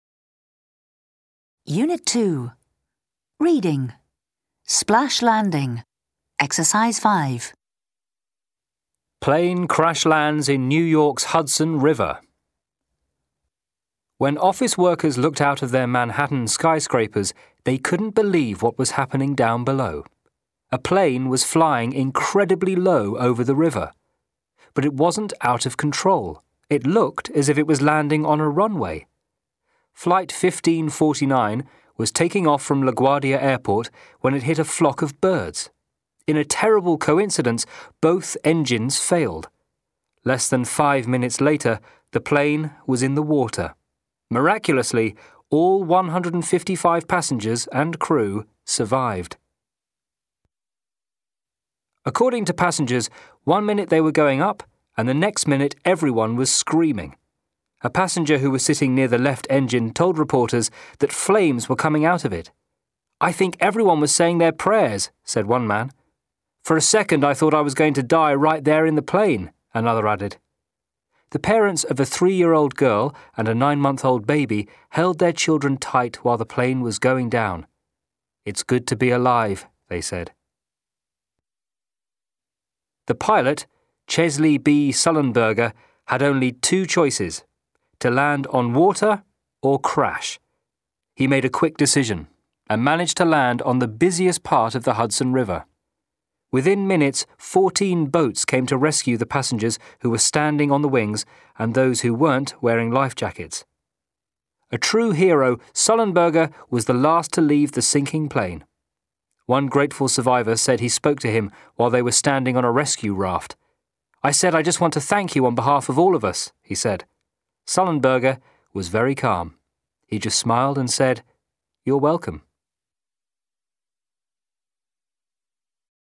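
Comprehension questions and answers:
Answer the questions:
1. Where did the plane take off?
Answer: From LaGuardia Airport.

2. Why did the engines fail?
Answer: The plane hit a flock of birds.

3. Were the passengers calm while the plane was coming down?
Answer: No, everyone was screaming.

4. Why did the pilot decide to land in the river?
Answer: He had only two choices: to land on water or crash.

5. Why didn't most of survivors get wet?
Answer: They were standing on the wings and 14 boats came to rescue them within minutes.

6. Did the pilot leave the plane as soon as it landed?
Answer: No, he was the last to leave the sinking plane.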